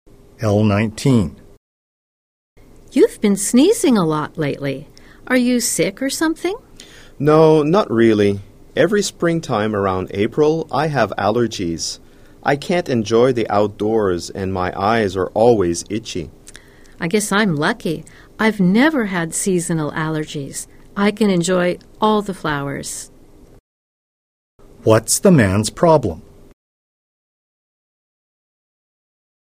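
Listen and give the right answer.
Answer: He has seasonal allergies in spring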